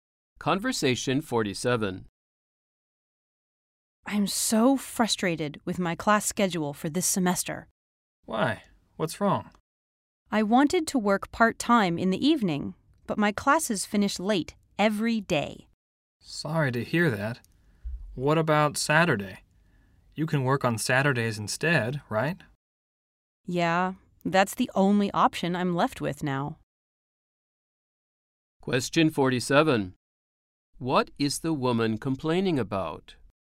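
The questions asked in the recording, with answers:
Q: What is the woman complaining about?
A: Her classes finish late every day, so she can't work part-time in the evenings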